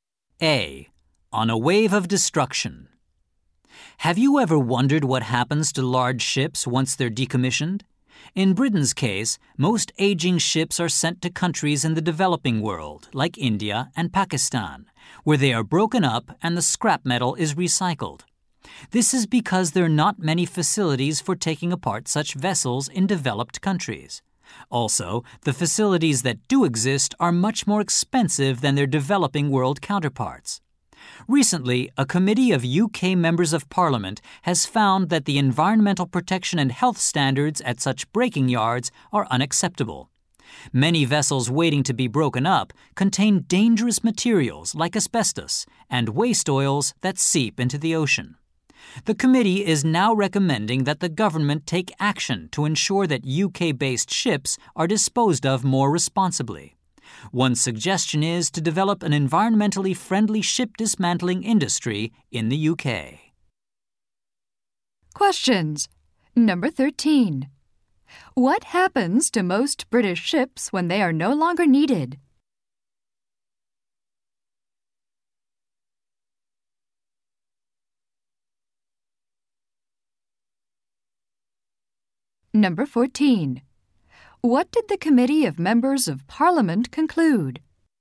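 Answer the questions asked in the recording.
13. They are sent to developing countries to be broken up for scrap
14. Environmental and health standards at the breaking yards are unacceptable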